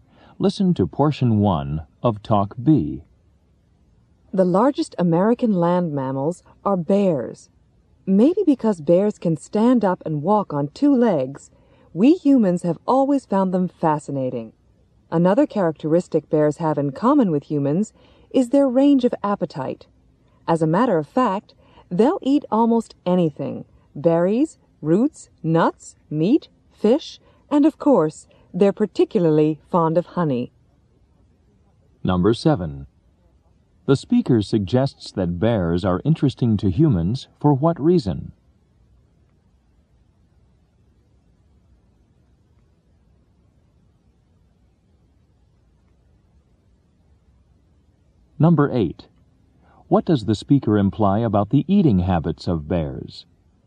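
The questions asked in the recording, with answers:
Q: The speaker suggests that bears are interesting to humans for what reason?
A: Because bears can stand up and walk on two legs

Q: What does the speaker imply about the eating habits of bears?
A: They eat almost anything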